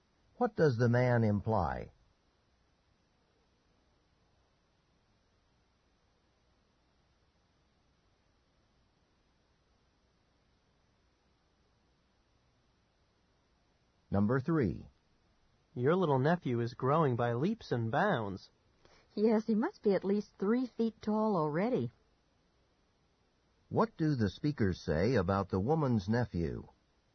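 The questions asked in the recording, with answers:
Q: What do the speakers say about the woman's nephew?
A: He is growing very fast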